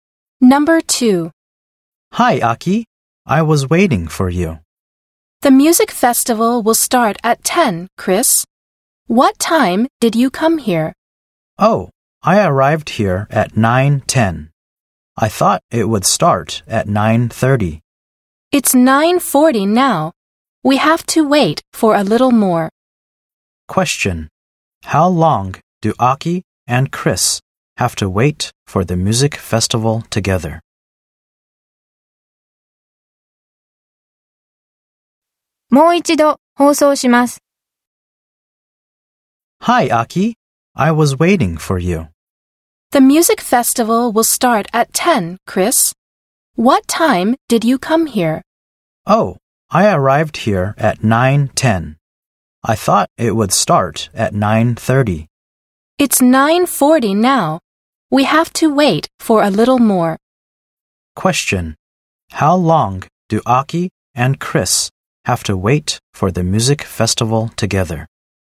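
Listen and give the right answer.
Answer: 20 minutes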